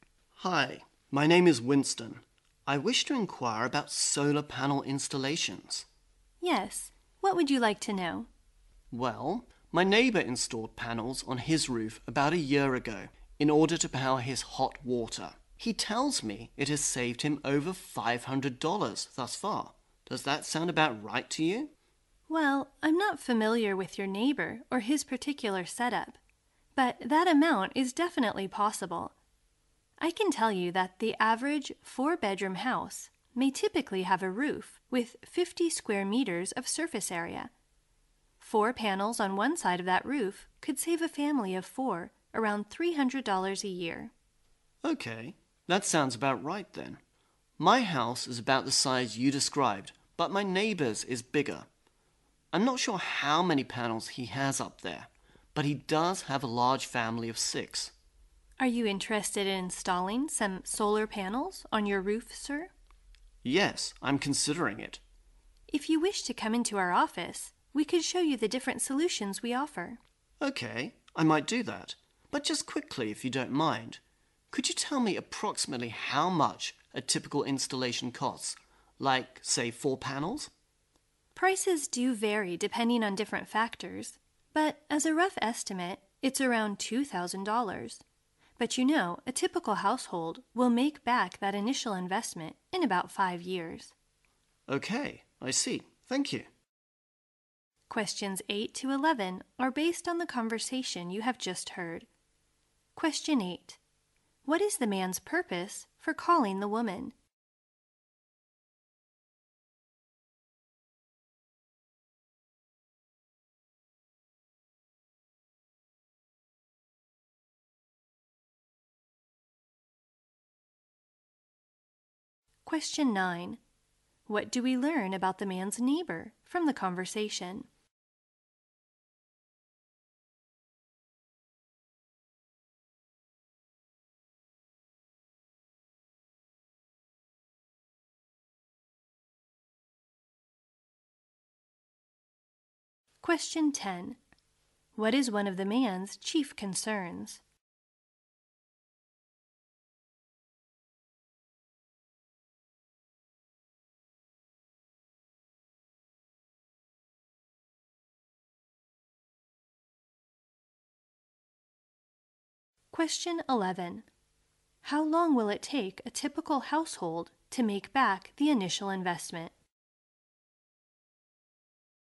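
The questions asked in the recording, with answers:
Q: What is the man's purpose for calling the woman?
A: To inquire about solar panel installations

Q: How long will it take a typical household to make back the initial investment?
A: About 5 years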